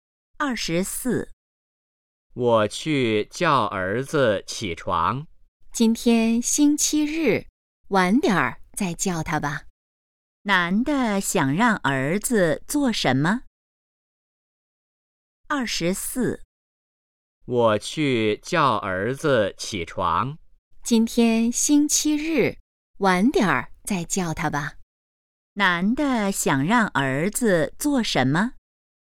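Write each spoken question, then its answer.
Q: 男的想让儿子做什么?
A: 起床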